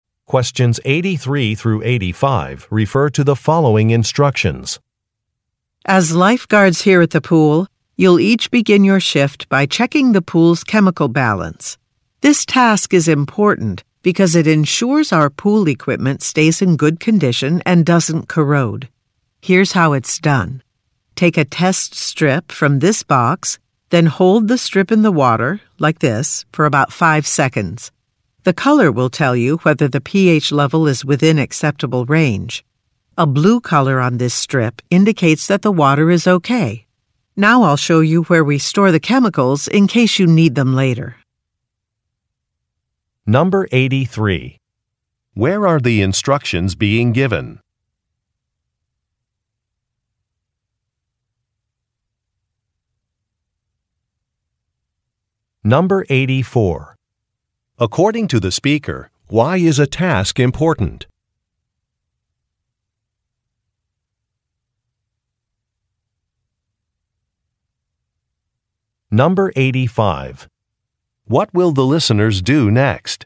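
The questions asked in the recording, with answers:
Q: Where are the instructions being given?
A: At a swimming pool

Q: According to the speaker, why is a task important?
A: It keeps the pool equipment in good condition and stops it from corroding

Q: What will the listeners do next?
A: See where the chemicals are stored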